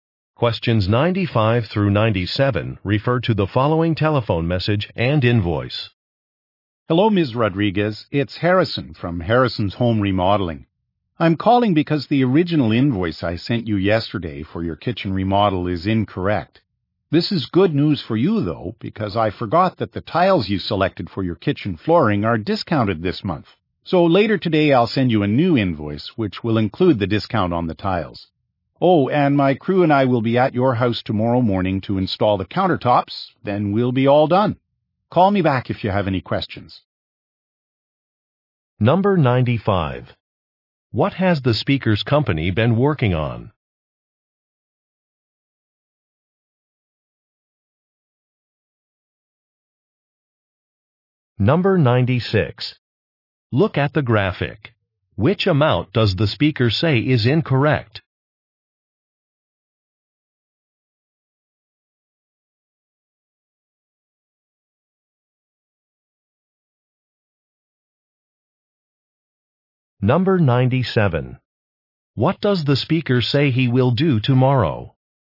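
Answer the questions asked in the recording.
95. A kitchen remodel
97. Install the countertops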